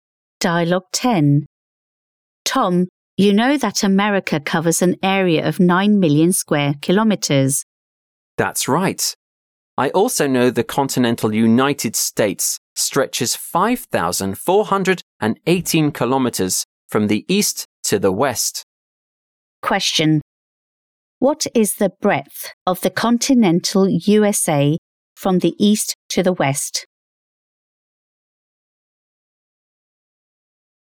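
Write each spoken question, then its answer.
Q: What is the breadth of the continental USA from the east to the west?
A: 5,418 kilometres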